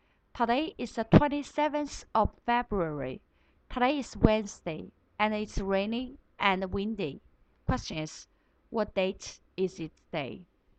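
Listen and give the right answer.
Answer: the 27th of February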